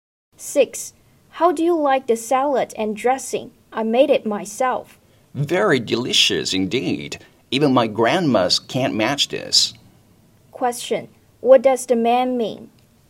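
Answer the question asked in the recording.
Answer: The salad is excellent, even better than his grandma's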